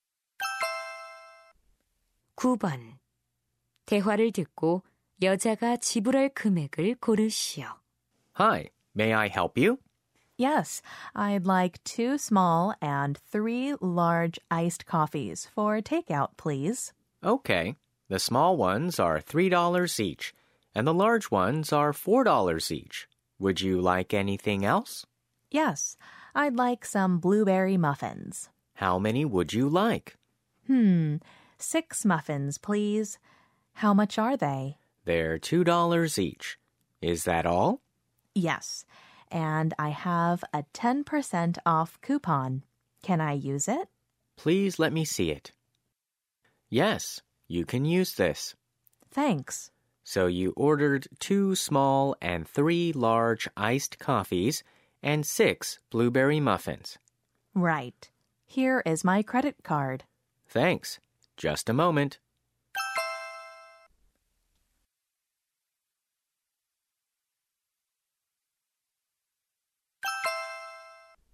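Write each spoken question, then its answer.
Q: 대화를 듣고 여자가 지불할 금액을 고르시오.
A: $27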